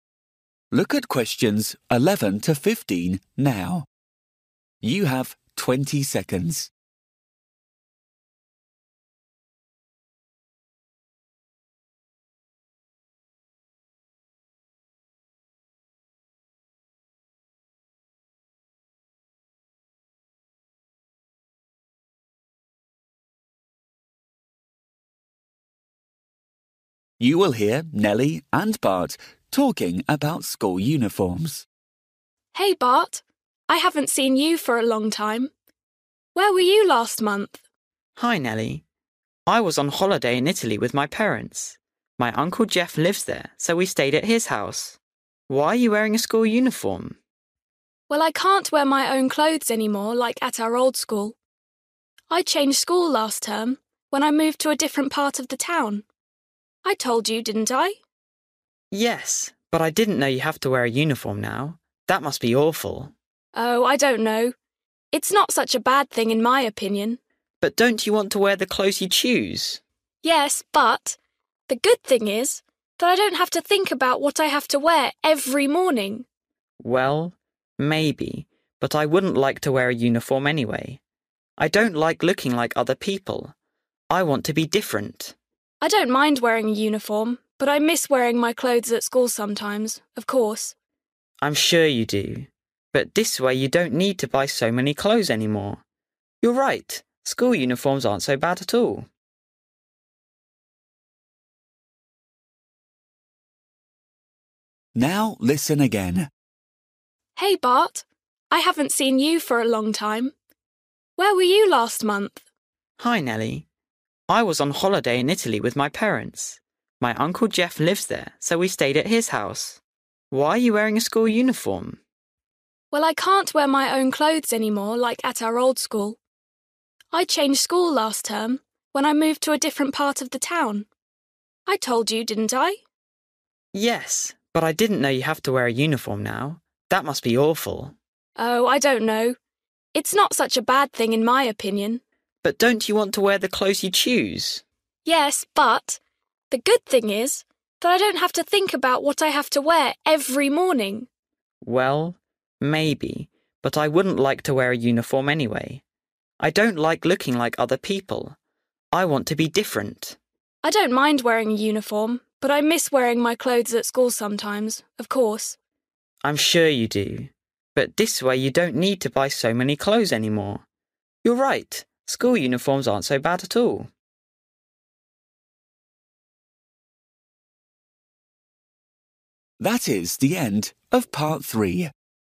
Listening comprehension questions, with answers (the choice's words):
For each question, choose the correct answer.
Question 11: Why have Nelly and Bart not met for a long time?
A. He was in a foreign country.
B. She changed school.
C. He was travelling with his Italian uncle.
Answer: He was in a foreign country.

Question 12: Why is Nelly wearing a school uniform?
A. Her own clothes are too old.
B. She goes to different school now.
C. Her old school now has a uniform.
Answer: She goes to different school now.

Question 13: What does Nelly think about uniforms?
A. They are boring.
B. She really loves wearing them.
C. She thinks they are useful.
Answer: She thinks they are useful.

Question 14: Why doesn't Bart like uniforms?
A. He thinks uniforms are too different.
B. He thinks everyone looks the same in a uniform.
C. He thinks most people don't like uniforms.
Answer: He thinks everyone looks the same in a uniform.

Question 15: How does Nelly feel about her clothes?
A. She would like to wear them to school sometimes.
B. She only wants to wear them on Sundays and Saturdays.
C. She doesn't like them anymore.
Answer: She would like to wear them to school sometimes.

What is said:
Nelly: Hey Bart: I haven't seen you for a long time. Where were you last month?
Bart: Hi Nelly, I was on holiday in Italy with my parents. My uncle Jeff lives there so we stayed at his house. Why are you wearing a school uniform?
Nelly: Well, I can't wear my own clothes any more like at our old school. I changed school last term when I moved to a different part of the town. I told you, didn't I?
Bart: Yes, but I didn't know you have to wear a uniform now. That must be awful!
Nelly: Oh I don't know. It's not such a bad thing, in my opinion.
Bart: But don't you want to wear the clothes you choose?
Nelly: Yes, but... the good thing is that I don't have to think about what I have to wear every morning.
Bart: Well, maybe... but I wouldn't like to wear a uniform anyway. I don't like looking like other people. I want to be different!
Nelly: I don't mind wearing a uniform but I miss wearing my clothes at school sometimes, of course...
Bart: I'm sure you do... but this way you don't need to buy so many clothes anymore. You're right, school uniforms aren't so bad at all!

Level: KET (A2)